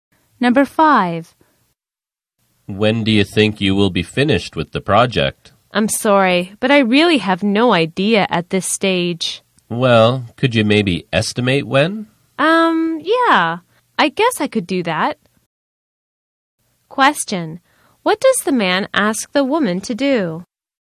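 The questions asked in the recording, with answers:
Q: What does the man ask the woman to do?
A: Estimate when she will finish the project.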